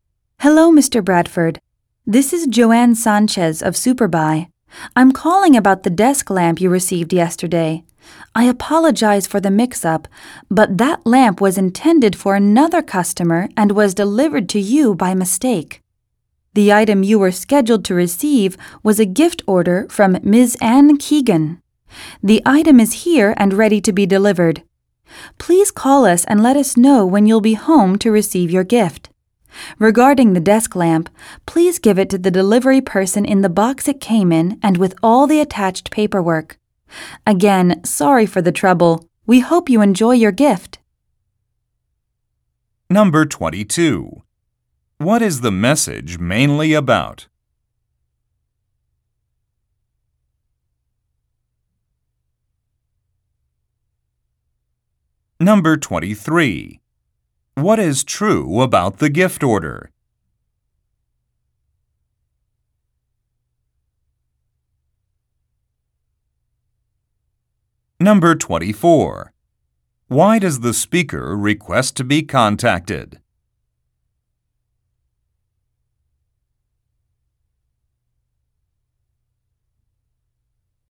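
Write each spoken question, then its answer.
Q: What is the message mainly about?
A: A lamp that was delivered to the wrong customer by mistake

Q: Why does the speaker request to be contacted?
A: To arrange a time to deliver the gift when he is home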